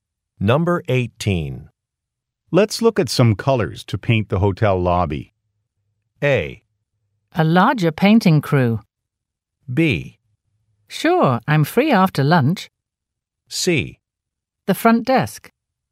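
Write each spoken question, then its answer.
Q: Let's look at some colors to paint the hotel lobby.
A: B: Sure, I'm free after lunch.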